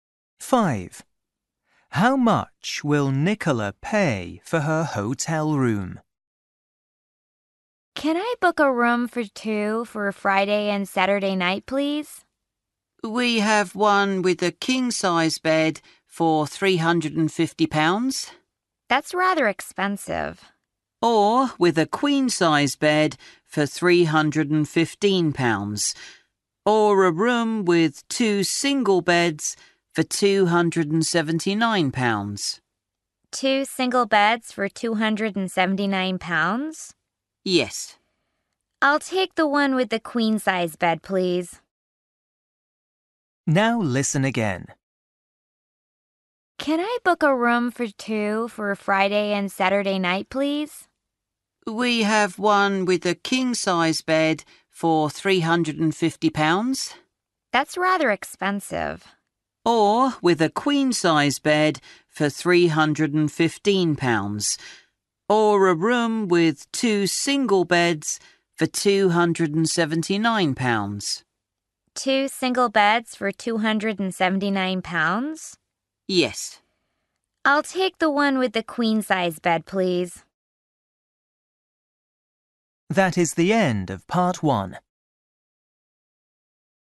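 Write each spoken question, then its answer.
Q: How much will Nicola pay for her hotel room?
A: £315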